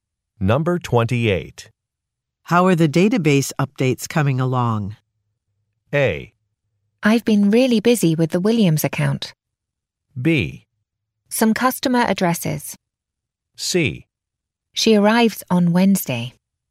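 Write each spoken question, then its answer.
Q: How are the database updates coming along?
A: A: I've been really busy with the Williams account.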